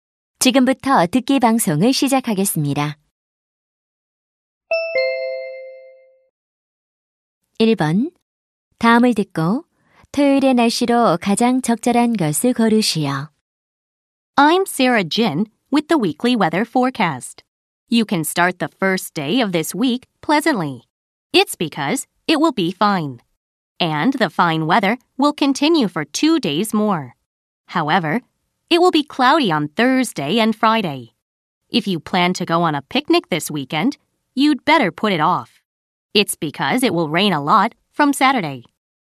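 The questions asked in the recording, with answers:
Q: 다음을 듣고 토요일의 날씨로 가장 적절한 것을 고르시오.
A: 비가 많이 옴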